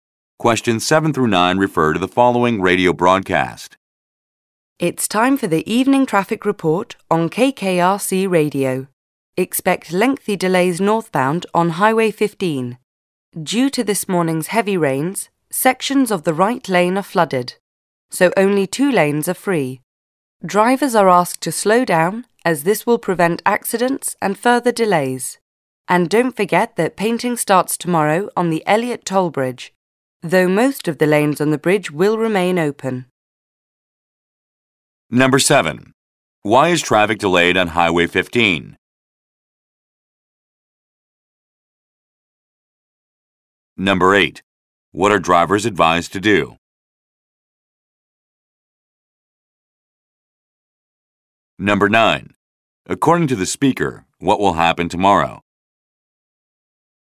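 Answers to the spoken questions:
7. Sections of the right lane are flooded from heavy rain
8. Slow down
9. Painting will start on the Elliot Toll Bridge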